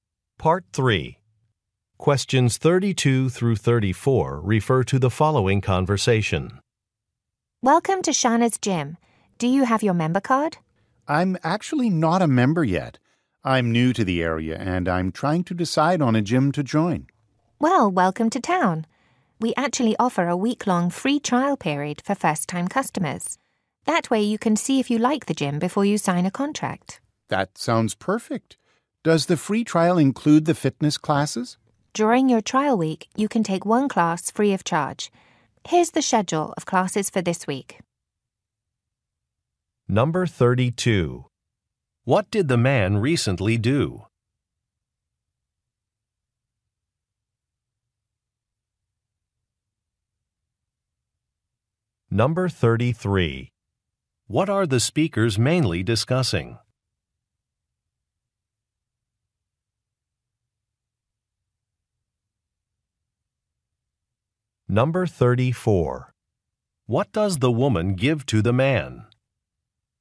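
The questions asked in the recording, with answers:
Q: What did the man recently do?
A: He moved to the area.

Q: What are the speakers mainly discussing?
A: A free trial gym membership.

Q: What does the woman give to the man?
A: A class schedule.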